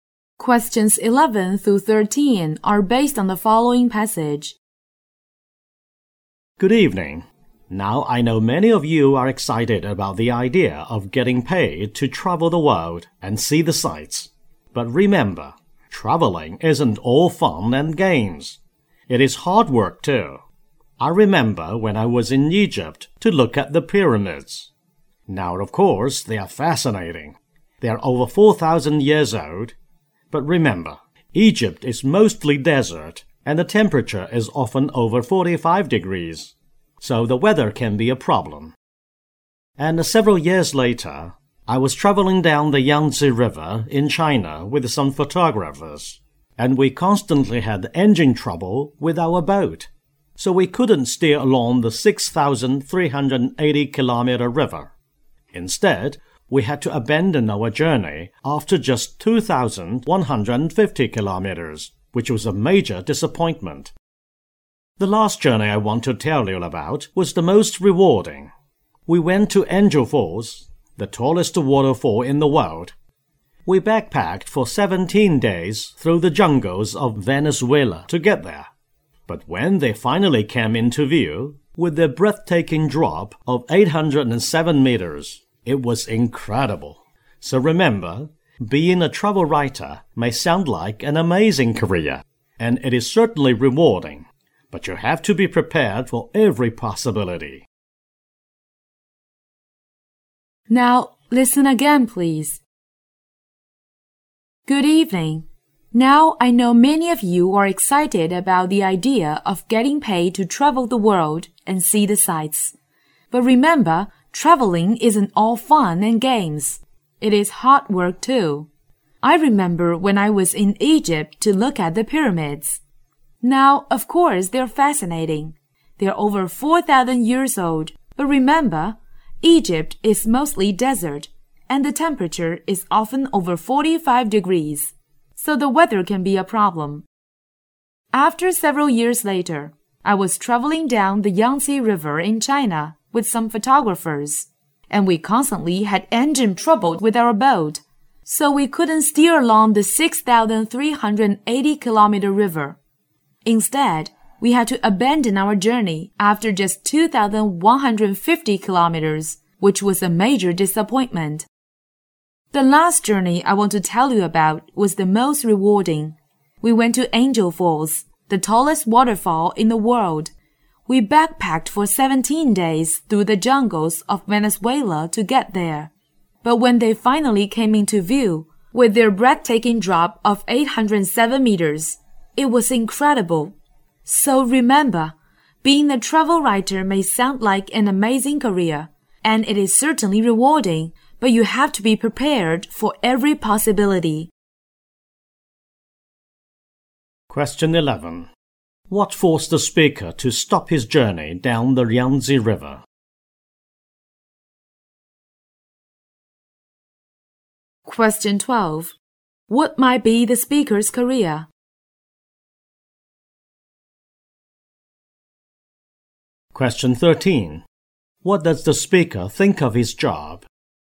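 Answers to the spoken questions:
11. Engine trouble with the boat
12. Travel writer
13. Rewarding but hard work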